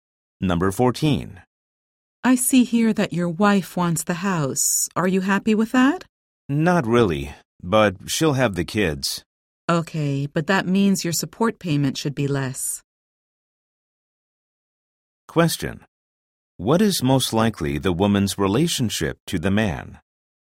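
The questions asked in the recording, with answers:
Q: What is most likely the woman's relationship to the man?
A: His divorce lawyer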